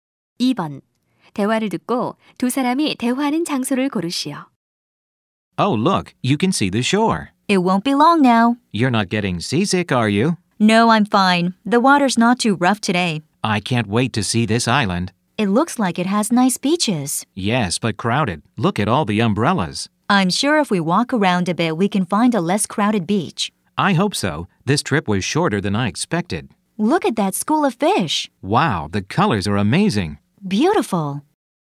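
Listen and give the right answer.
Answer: 배 위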